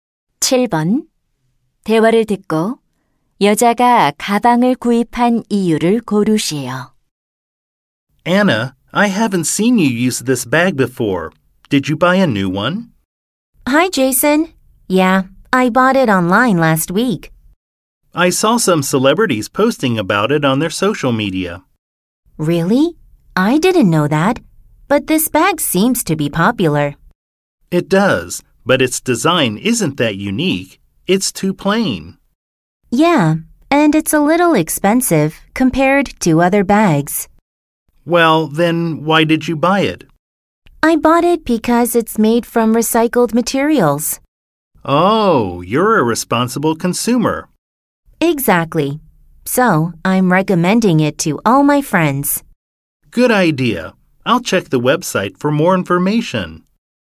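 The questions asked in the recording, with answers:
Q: 대화를 듣고 여자가 가방을 구입한 이유를 고르시오.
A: 재활용 소재로 만들어져서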